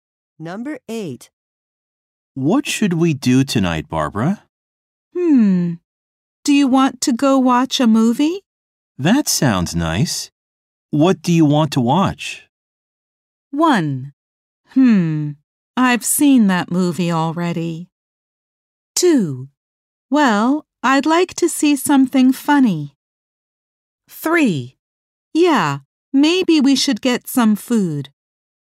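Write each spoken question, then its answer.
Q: That sounds nice. What do you want to watch?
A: 2: Well, I'd like to see something funny.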